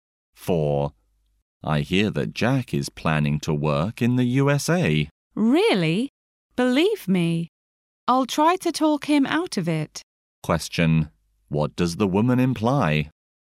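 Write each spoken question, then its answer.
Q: What does the woman imply?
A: She will try to persuade Jack not to work in the USA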